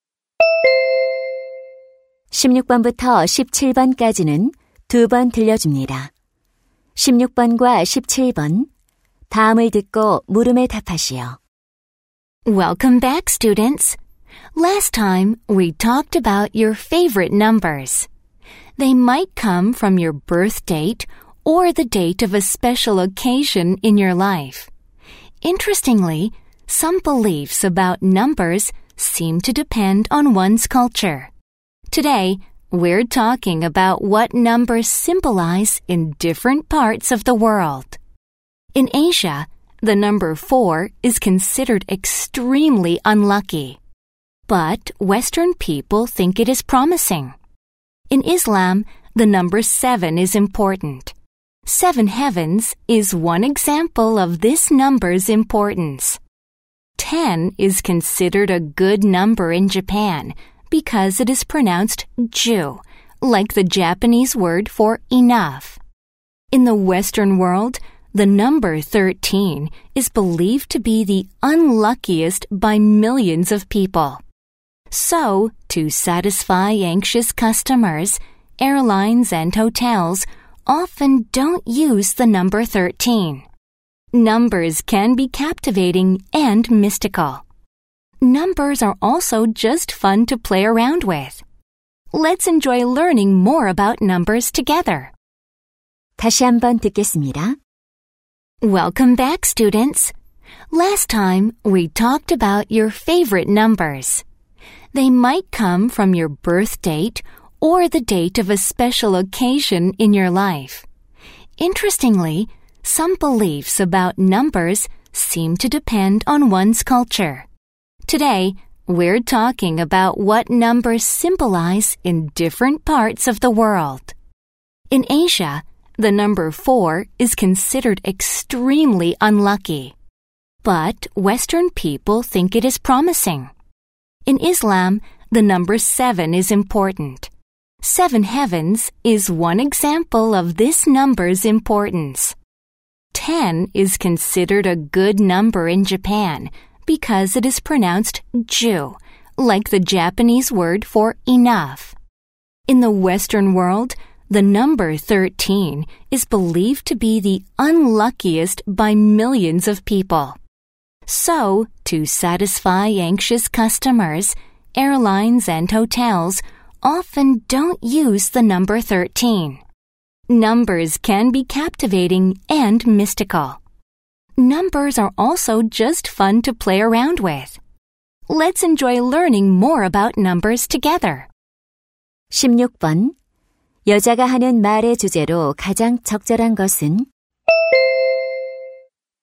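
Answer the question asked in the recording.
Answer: 문화권에 따라 숫자가 상징하는 의미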